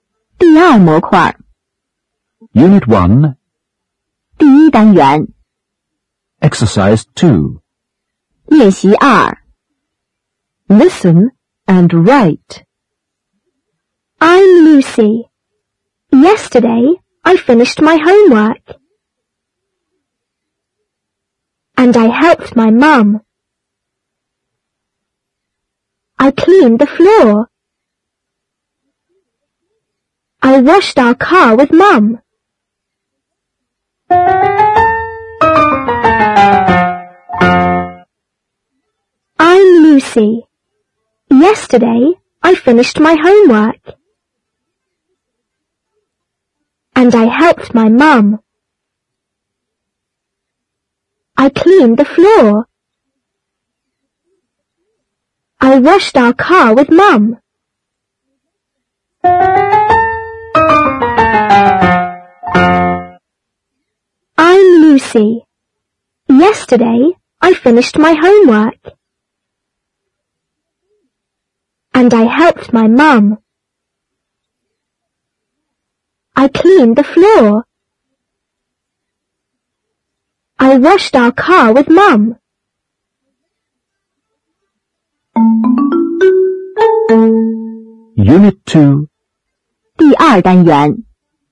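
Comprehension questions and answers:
2. Listen and write.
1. YesterdayI ________ my home work And I ________my mum.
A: finished; helped

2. I _______the floor.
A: cleaned

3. I_______our car with Mum.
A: washed

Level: 第七册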